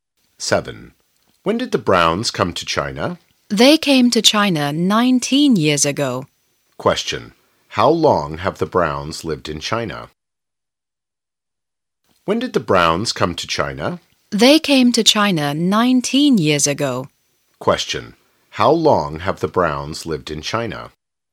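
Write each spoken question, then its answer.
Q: How long have the Browns lived in China?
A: For 19 years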